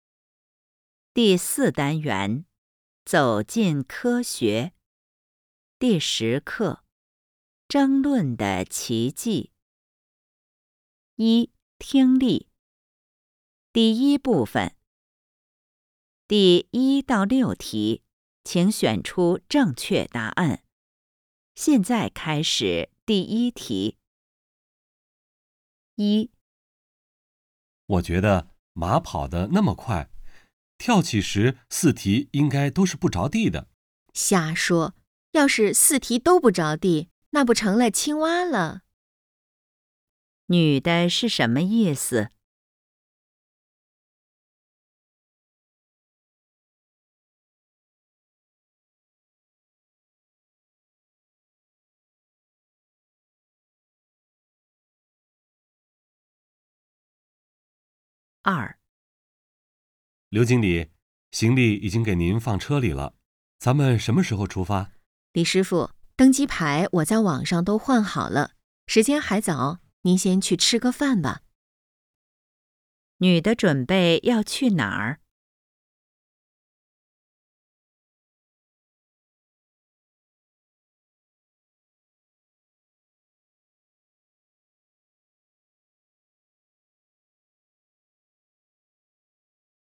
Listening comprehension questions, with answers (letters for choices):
第1-6题:请选择正确答案。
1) 女的是什么意思?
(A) 马比青蛙跳得远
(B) 不着地时跑得快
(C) 马的四蹄都不落地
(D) 不会四蹄都不着地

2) 女的准备去哪里儿?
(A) 饭馆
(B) 公司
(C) 机场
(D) 火车站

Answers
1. D
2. C

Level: HSK 5